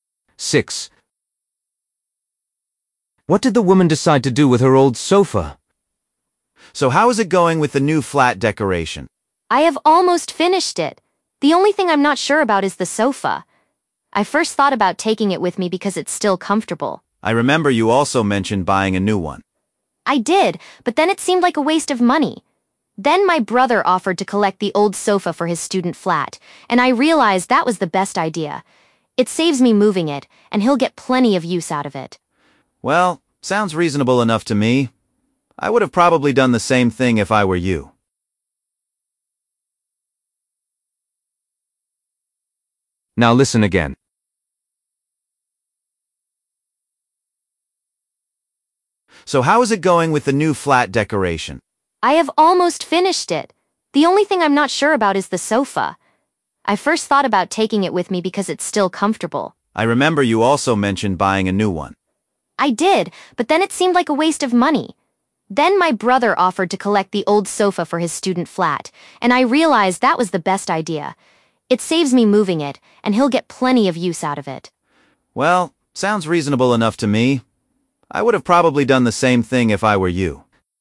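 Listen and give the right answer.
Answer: give it to her brother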